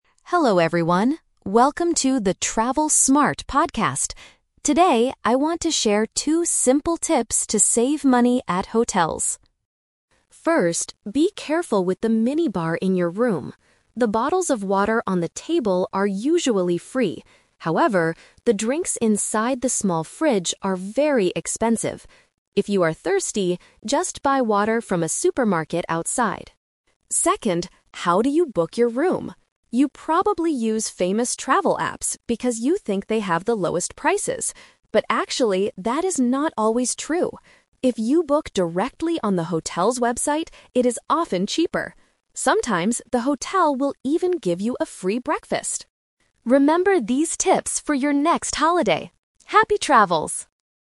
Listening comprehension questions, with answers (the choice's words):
Listen to a travel podcast about hotel tips. Choose the correct answer (A, B, or C) for each question.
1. What does the host say about the drinks in the small fridge?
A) They are usually free.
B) They are very expensive.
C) You can buy them at the supermarket.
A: They are very expensive.

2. What do many people believe about travel apps?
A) They have the lowest prices.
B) They are difficult to use.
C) They always give you a free breakfast.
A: They have the lowest prices.

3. What is the host's advice for booking a room? (The Twist)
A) Always use famous travel apps.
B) Book directly on the hotel's website.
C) Ask the hotel for a cheaper room.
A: Book directly on the hotel's website.

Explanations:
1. The host clearly warns listeners: "However, the drinks inside the small fridge are very expensive." Trap: Option A is a trap because the water on the table is free, not the drinks in the fridge. Option C is a trap because the host tells you to buy water at the supermarket instead of using the fridge.
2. The host talks about what people usually think: "You probably use famous travel apps because you think they have the lowest prices." Trap: Option B is never mentioned in the audio. Option C is a trap because "free breakfast" is what you might get if you book on the hotel's website, not on the apps.
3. This is the Twist. The host tells you that travel apps are not always the cheapest. He advises, "If you book directly on the hotel's website, it is often cheaper." Trap: Option A is what people usually do, but the host advises against it. Option C is a plausible way to save money, but it is not the host's advice.

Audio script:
Host: Hello everyone, welcome to the "Travel Smart" podcast! Today, I want to share two simple tips to save money at hotels.
First, be careful with the mini-bar in your room. The bottles of water on the table are usually free. However, the drinks inside the small fridge are very expensive. If you are thirsty, just buy water from a supermarket outside.
Second, how do you book your room? You probably use famous travel apps because you think they have the lowest prices. But actually, that is not always true! If you book directly on the hotel's website, it is often cheaper. Sometimes, the hotel will even give you a free breakfast.
Remember these tips for your next holiday. Happy travels!